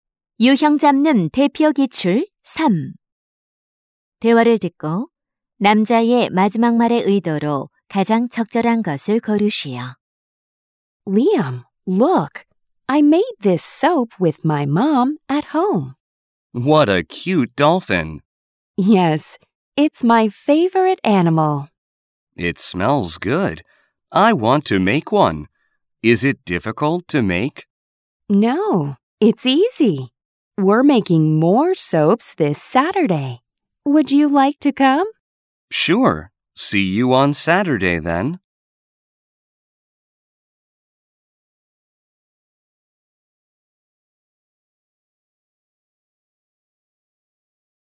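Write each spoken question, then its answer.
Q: 대화를 듣고 남자의 마지막 말의 의도로 가장 적절한 것을 고르시오.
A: 수락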